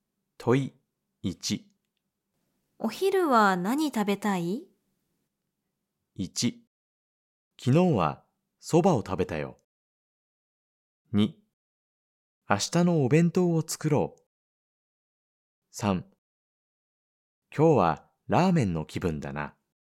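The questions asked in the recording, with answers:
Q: お昼は何食べたい?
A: 3: 今日はラーメンの気分だな。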